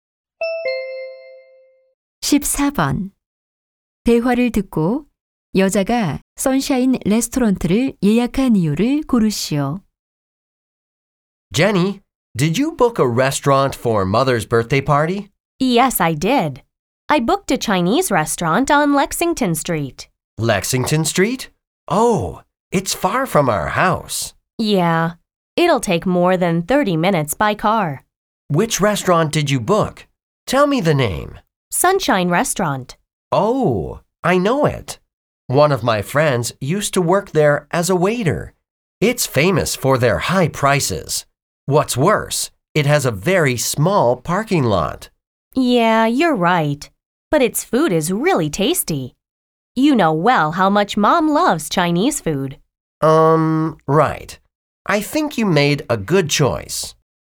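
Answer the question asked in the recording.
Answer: 음식이 맛있고 엄마가 중국 음식을 좋아해서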